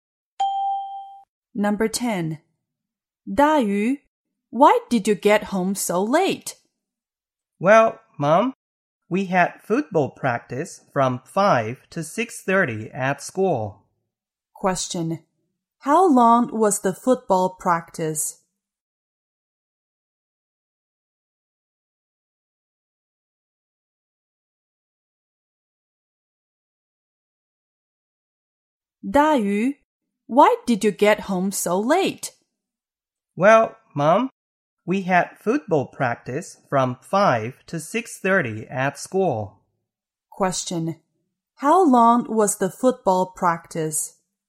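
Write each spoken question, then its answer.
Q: How long was the football practice?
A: One and a half hours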